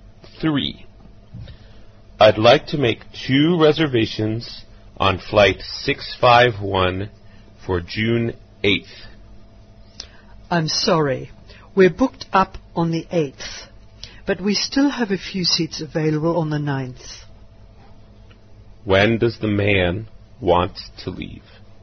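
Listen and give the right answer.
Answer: On June 8th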